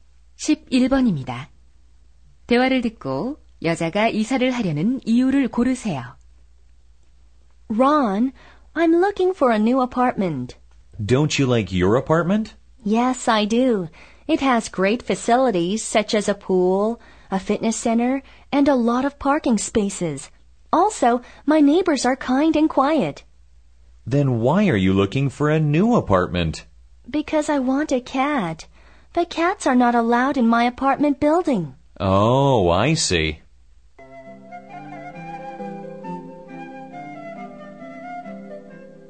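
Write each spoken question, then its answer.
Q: 대화를 듣고 여자가 이사를 하려는 이유를 고르세요.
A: 고양이를 키우고 싶은데 지금 아파트는 고양이를 금지해서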